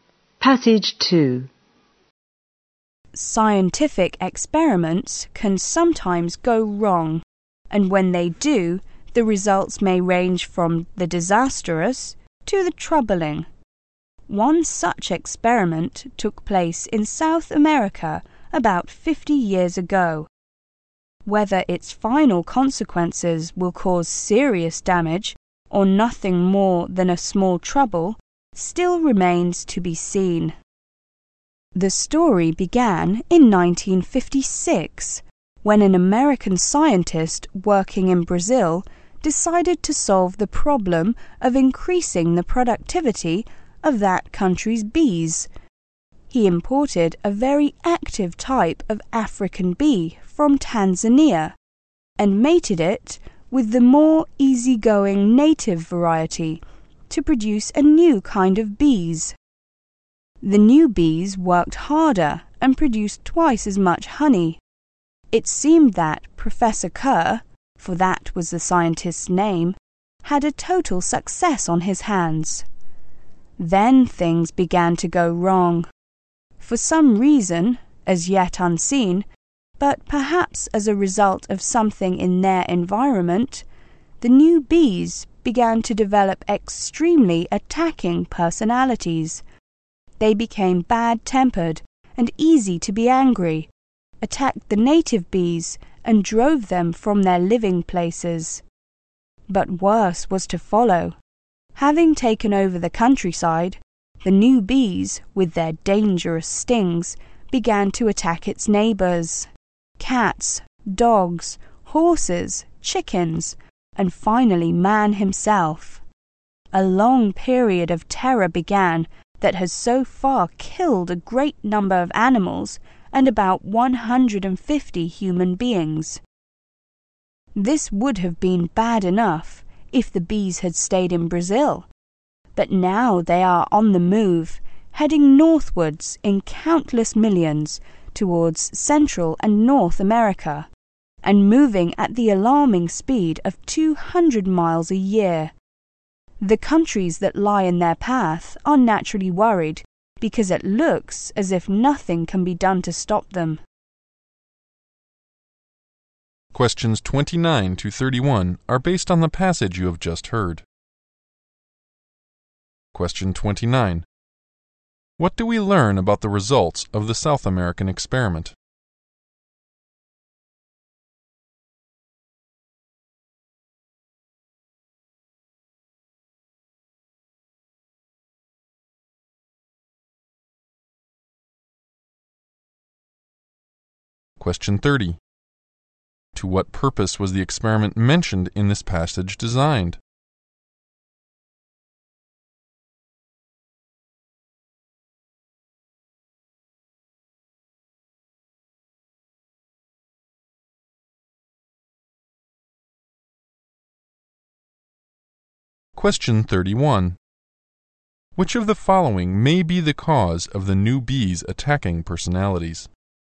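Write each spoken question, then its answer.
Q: What do we learn about the results of the South American experiment?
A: The new bees became aggressive and killed many animals and about 150 people

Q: To what purpose was the experiment mentioned in this passage designed?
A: To increase the productivity of Brazil's bees

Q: Which of the following may be the cause of the new bees attacking personalities?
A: Something in their environment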